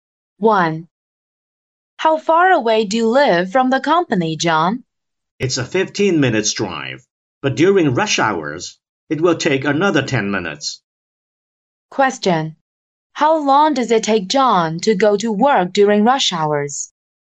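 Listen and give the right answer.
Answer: 25 minutes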